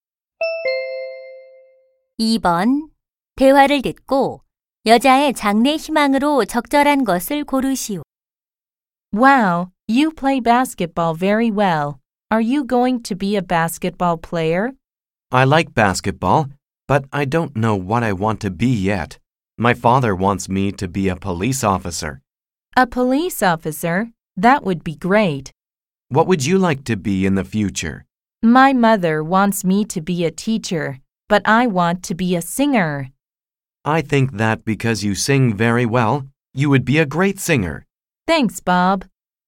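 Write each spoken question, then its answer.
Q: 대화를 듣고 여자의 장래 희망으로 적절한 것을 고르시오.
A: 가수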